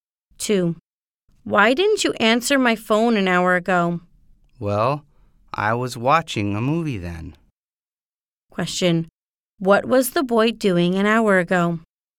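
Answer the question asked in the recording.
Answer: Watching a movie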